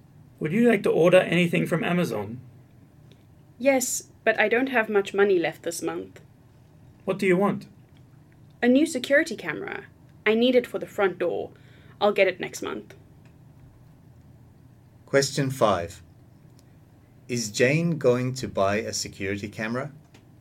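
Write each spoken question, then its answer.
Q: Is Jane going to buy a security camera?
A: Yes, next month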